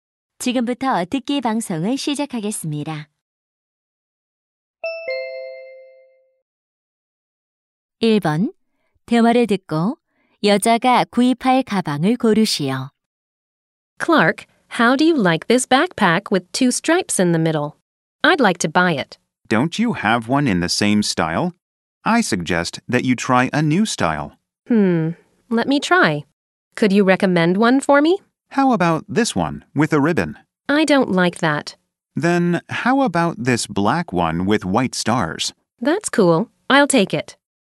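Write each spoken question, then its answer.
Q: 대화를 듣고 여자가 구입할 가방을 고르시오.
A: 흰 별이 있는 검은색 가방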